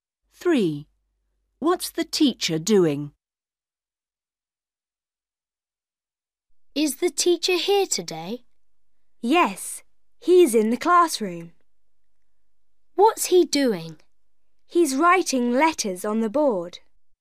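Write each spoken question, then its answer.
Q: What's the teacher doing?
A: He's writing letters on the board.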